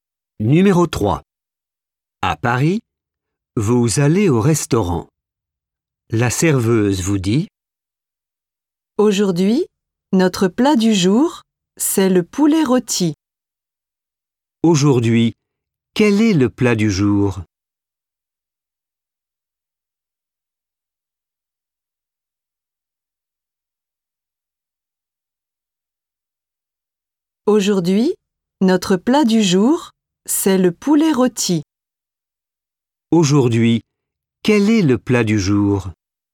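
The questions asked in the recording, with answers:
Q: Aujourd'hui, quel est le plat du jour ?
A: Le poulet rôti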